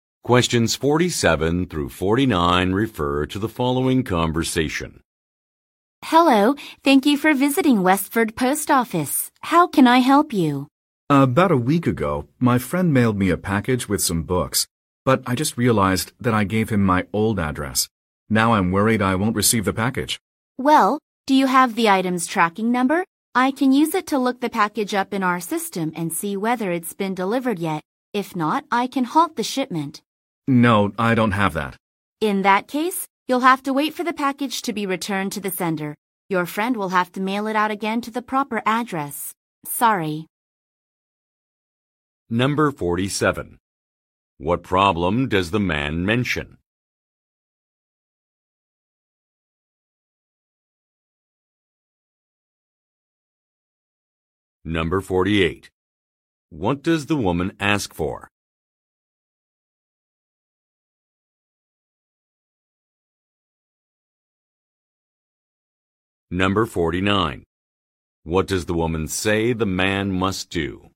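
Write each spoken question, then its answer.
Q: What problem does the man mention?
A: He gave his friend his old address for a package.

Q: What does the woman ask for?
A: The package's tracking number

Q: What does the woman say the man must do?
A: Wait for the package to be returned to the sender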